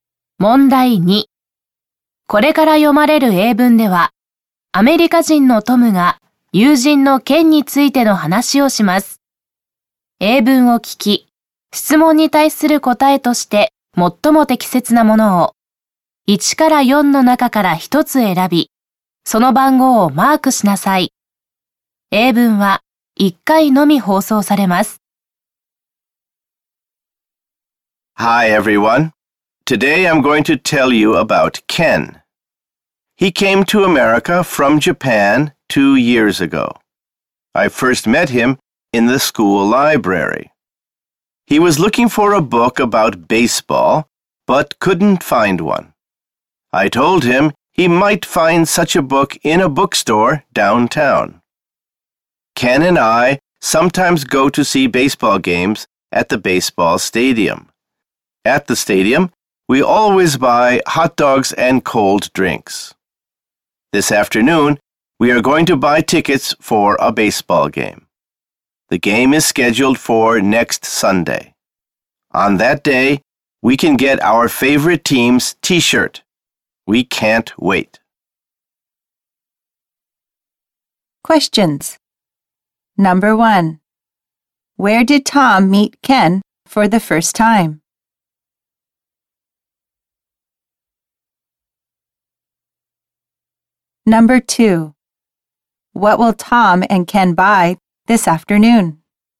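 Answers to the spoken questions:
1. In the school library
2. Tickets for a baseball game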